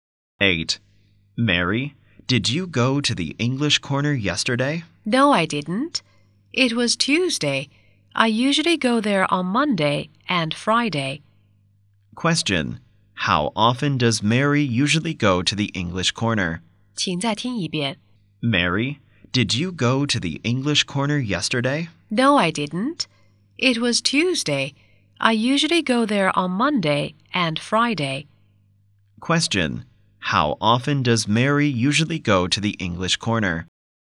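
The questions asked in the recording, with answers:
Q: How often does Mary usually go to the English Corner?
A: Twice a week (on Monday and Friday).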